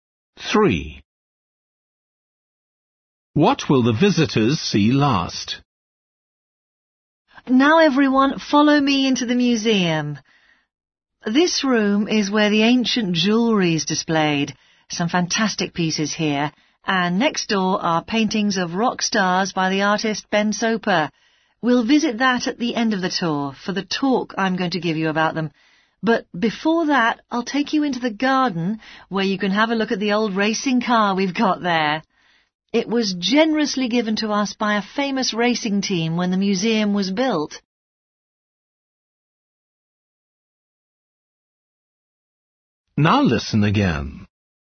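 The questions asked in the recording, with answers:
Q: What will the visitors see last?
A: the paintings of rock stars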